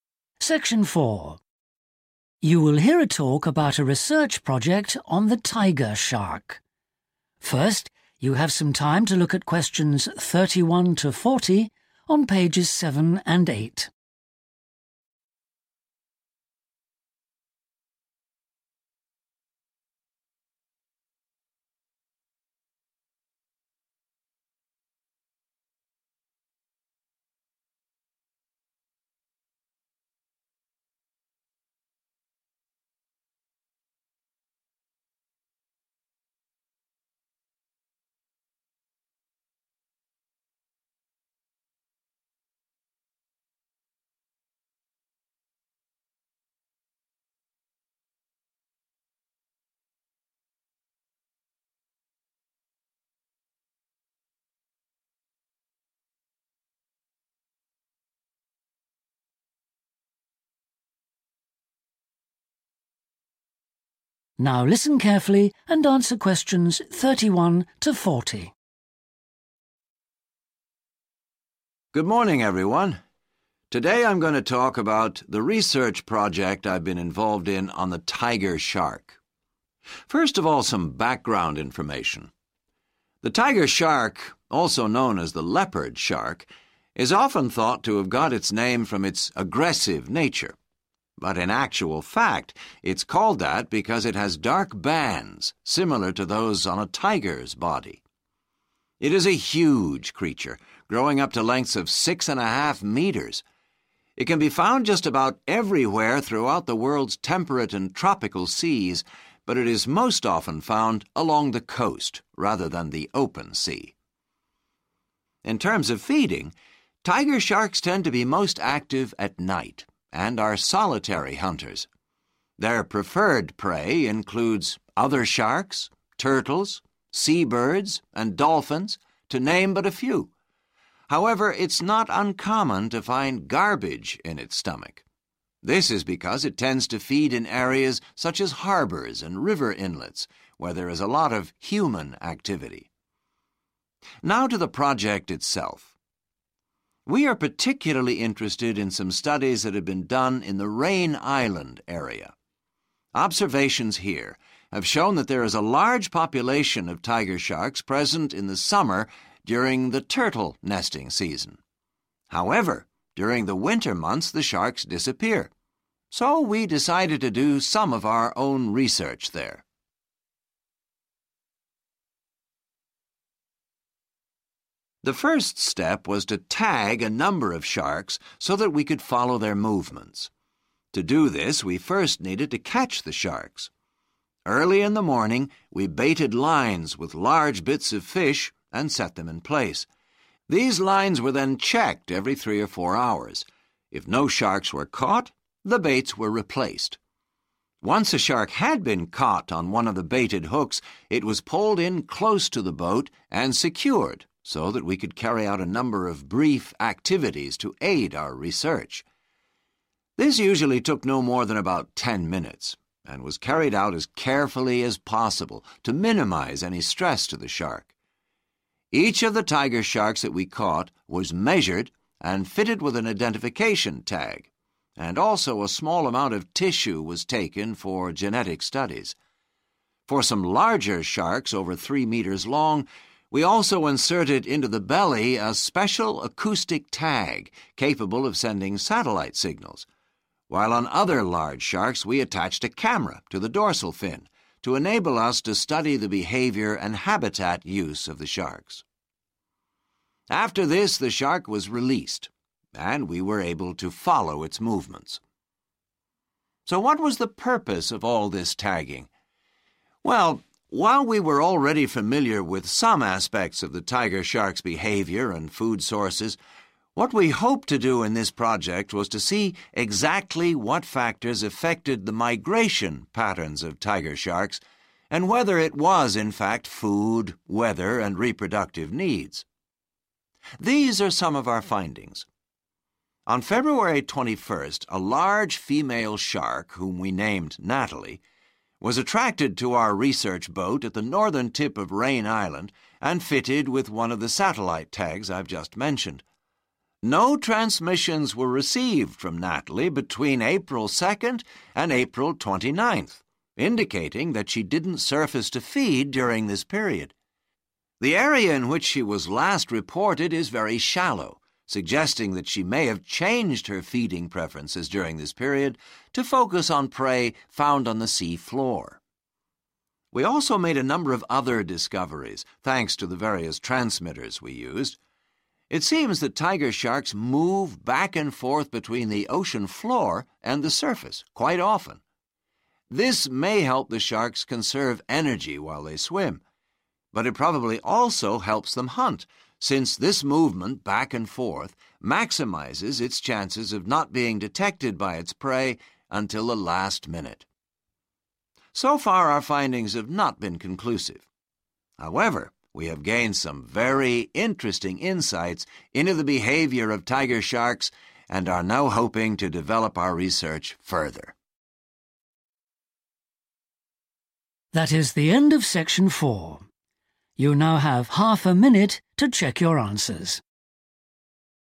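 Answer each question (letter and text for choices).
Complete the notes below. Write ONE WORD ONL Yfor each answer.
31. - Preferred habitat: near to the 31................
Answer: coast

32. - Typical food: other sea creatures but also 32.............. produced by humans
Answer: garbage

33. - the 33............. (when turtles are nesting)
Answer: summer

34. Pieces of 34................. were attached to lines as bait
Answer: fish

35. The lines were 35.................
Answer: checked

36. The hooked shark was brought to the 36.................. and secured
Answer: boat

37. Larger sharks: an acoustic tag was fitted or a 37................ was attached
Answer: camera

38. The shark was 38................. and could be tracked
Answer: released

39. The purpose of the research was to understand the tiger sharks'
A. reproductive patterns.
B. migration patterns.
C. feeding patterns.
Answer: B. 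migration patterns.

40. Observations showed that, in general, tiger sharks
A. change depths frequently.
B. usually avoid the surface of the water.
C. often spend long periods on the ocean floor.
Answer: A. change depths frequently.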